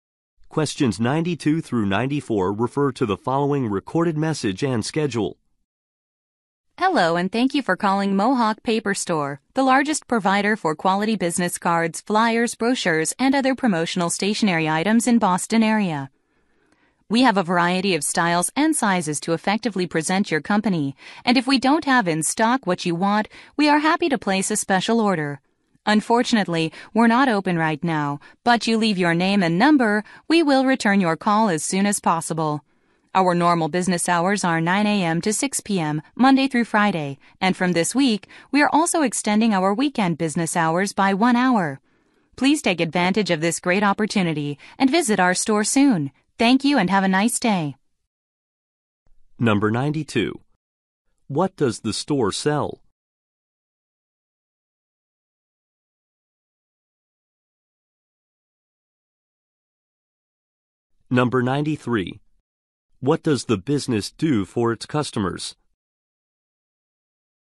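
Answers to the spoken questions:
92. Business cards, flyers, brochures and promotional stationery
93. Places special orders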